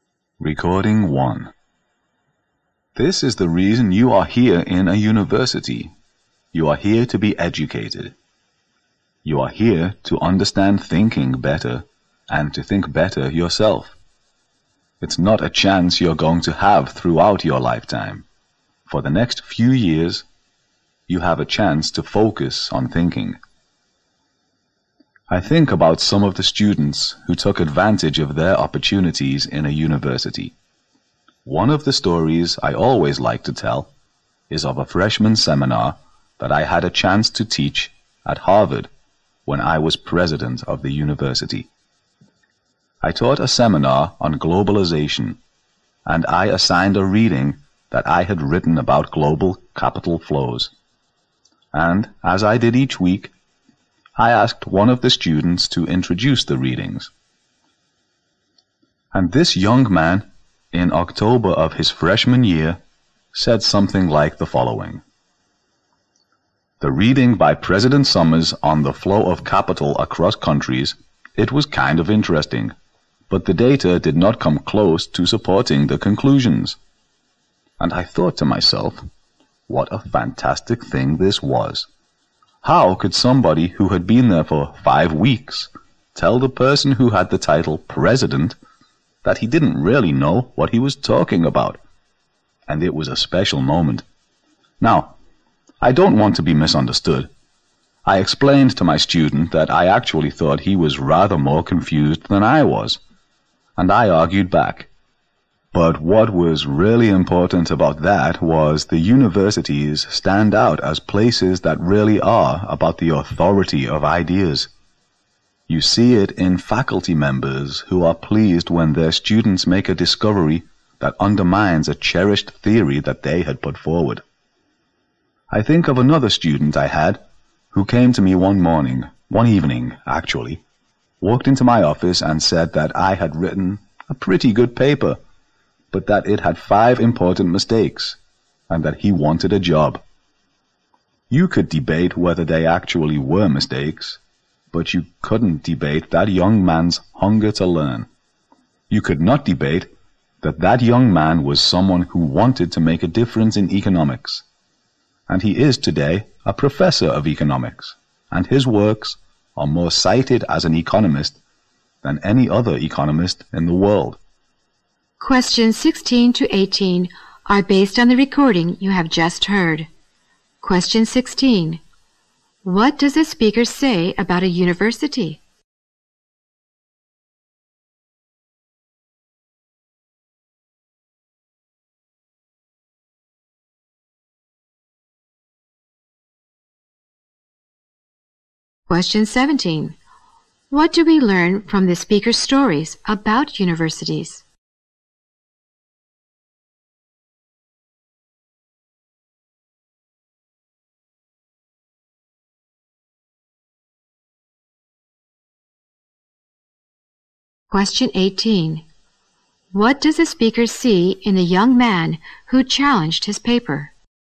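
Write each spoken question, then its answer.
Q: What does a speaker say about a university?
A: It is a place to learn to think better

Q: What do we learn from the speaker's stories about universities?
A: Universities are about the authority of ideas

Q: What does the speaker see in the young man who challenged his paper?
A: His hunger to learn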